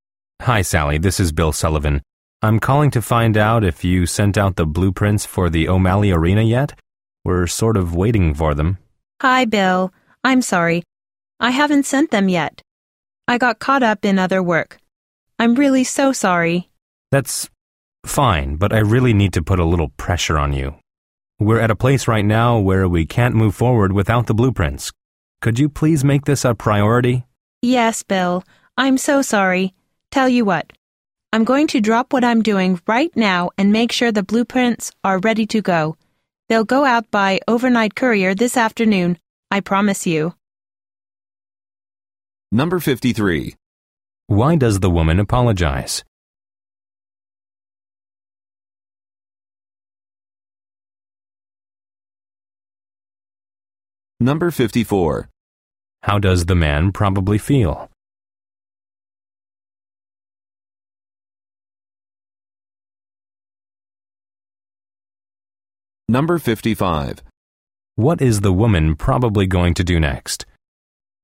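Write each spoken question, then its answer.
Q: Why does the woman apologize?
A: She hasn't sent the blueprints yet.

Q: What is the woman probably going to do next?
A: Get the blueprints ready to send by overnight courier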